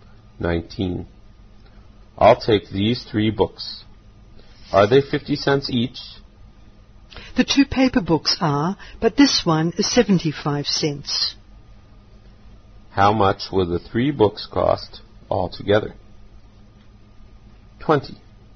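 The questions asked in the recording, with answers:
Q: How much will the 3 books cost altogether?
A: $1.75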